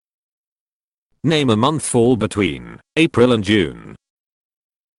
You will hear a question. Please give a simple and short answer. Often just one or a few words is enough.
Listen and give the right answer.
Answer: May